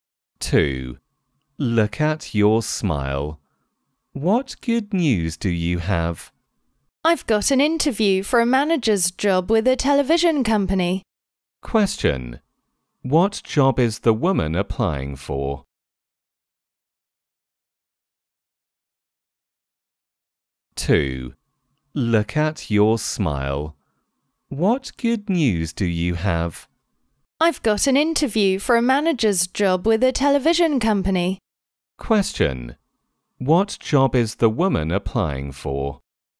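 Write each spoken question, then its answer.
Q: What job is the woman applying for?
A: A manager's job with a television company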